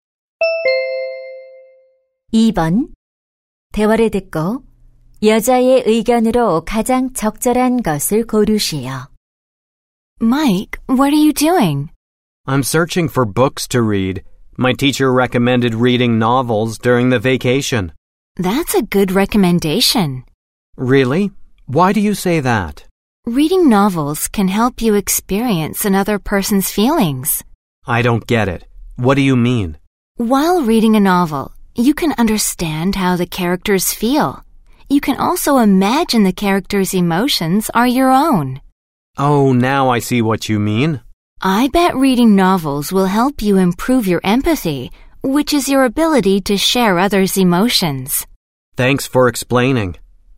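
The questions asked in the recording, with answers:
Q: 대화를 듣고 여자의 의견으로 가장 적절한 것을 고르시오.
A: 소설 읽기는 공감 능력 향상에 도움이 된다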